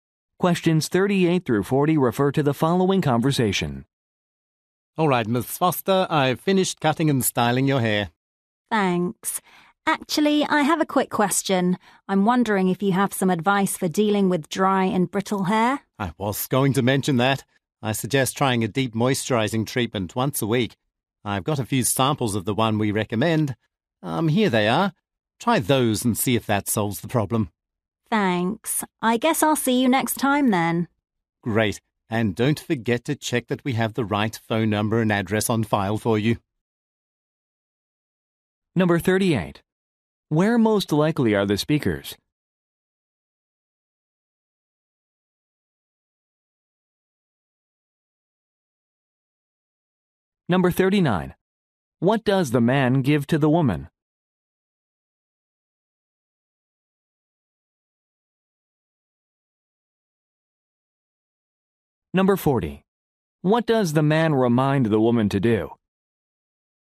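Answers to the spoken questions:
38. At a hair salon
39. Samples of a moisturizing treatment
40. Check that her phone number and address on file are correct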